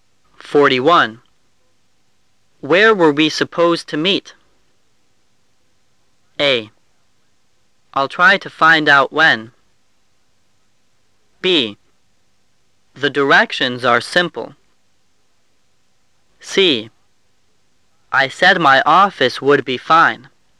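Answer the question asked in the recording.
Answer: C: I said my office would be fine.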